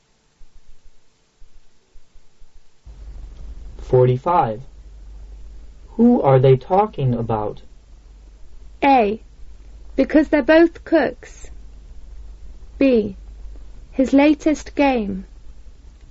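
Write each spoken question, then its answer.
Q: Who are they talking about?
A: C: The new assistant manager.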